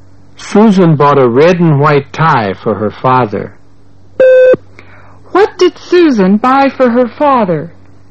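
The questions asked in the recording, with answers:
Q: What did Susan buy for her father?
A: A red and white tie.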